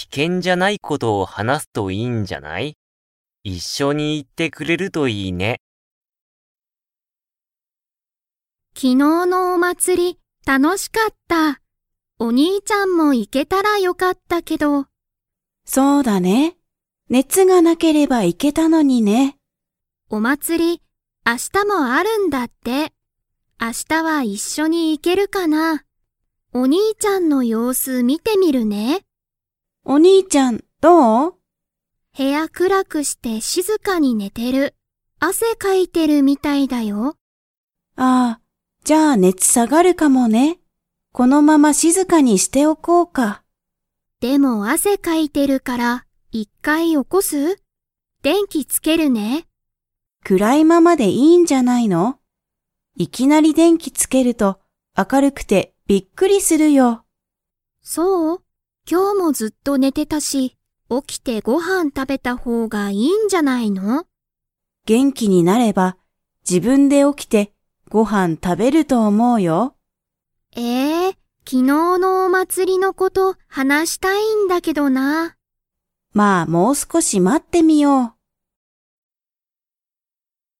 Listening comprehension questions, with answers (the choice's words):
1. 昨日きのう、お兄にいちゃんはお祭まつりに 。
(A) 行いけた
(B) 行いけなかった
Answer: 行いけなかった

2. マキと母ははは、このあとどうしますか?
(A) もう少すこし待まつ。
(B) お兄にいちゃんを起おこす。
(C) 電気でんきをつける。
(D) ご飯はんを食たべる。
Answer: もう少すこし待まつ。

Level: Level 4